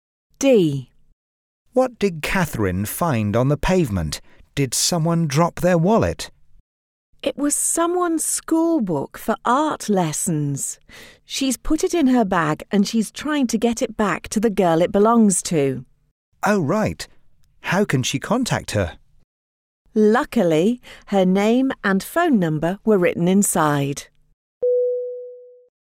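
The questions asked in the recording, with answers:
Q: What did Catherine find on the pavement?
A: Someone's school book for art lessons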